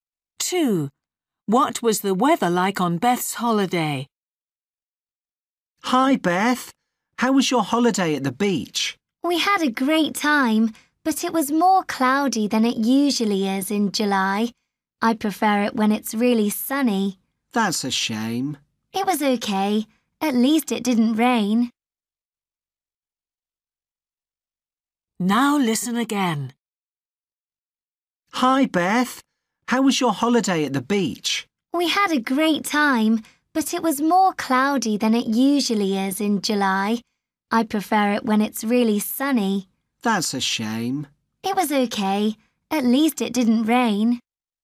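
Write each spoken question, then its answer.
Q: What was the weather like on Beth's holiday?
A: cloudy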